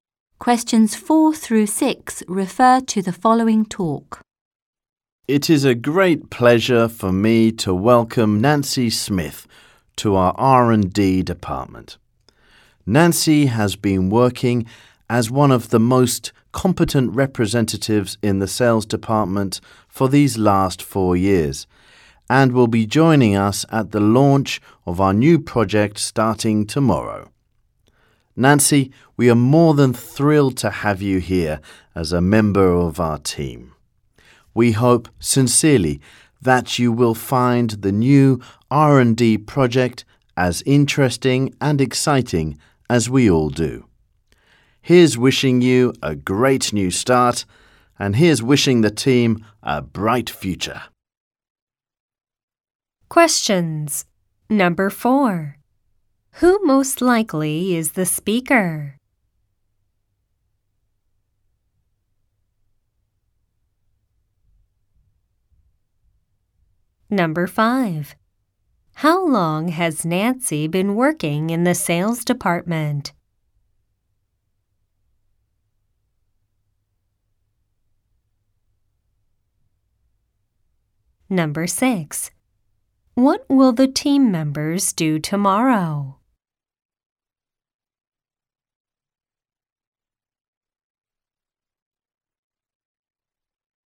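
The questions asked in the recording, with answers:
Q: How long has Nancy been working in the sales department?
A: 4 years

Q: What will the team members do tomorrow?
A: Launch a new project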